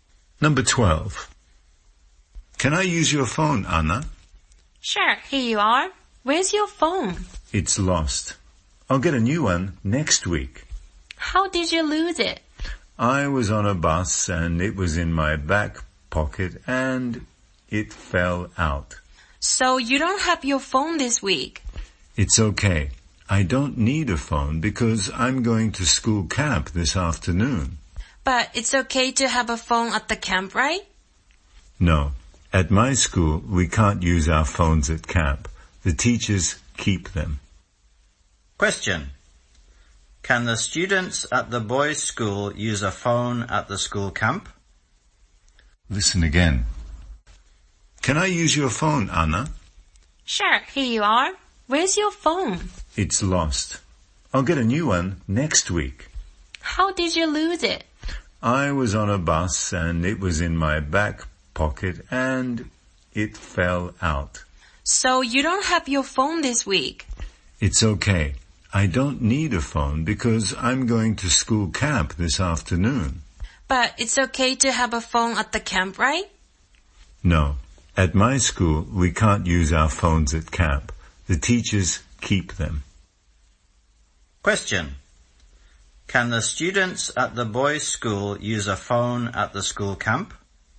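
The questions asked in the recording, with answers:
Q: Can the students at the boys' school use a phone at the school camp?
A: No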